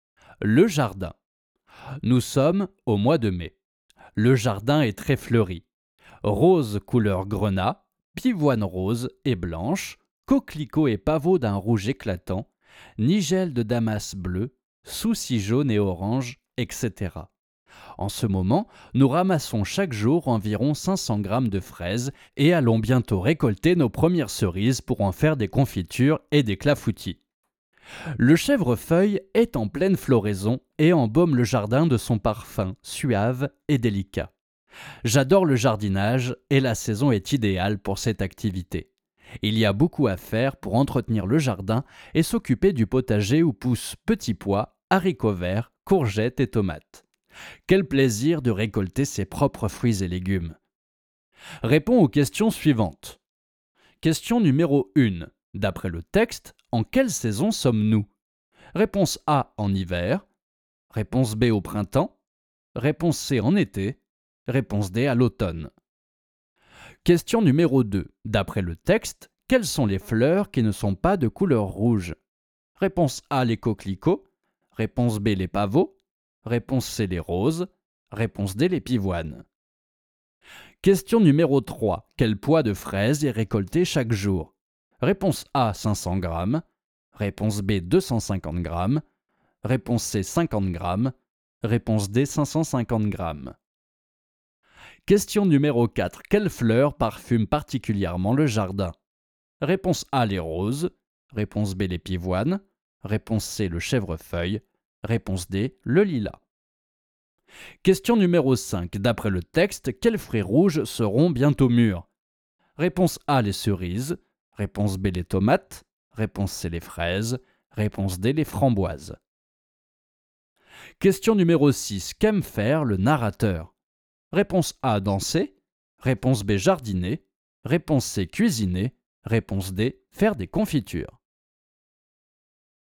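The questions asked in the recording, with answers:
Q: D'après le texte, en quelle saison sommes-nous?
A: B: au printemps

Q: Quel poids de fraises est récolté chaque jour?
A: A: 500 grammes

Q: Quelle fleur parfume particulièrement le jardin?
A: C: le chèvrefeuille

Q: D'après le texte, quels fruits rouges seront bientôt mûrs?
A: A: les cerises

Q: Qu'aime faire le narrateur?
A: B: jardiner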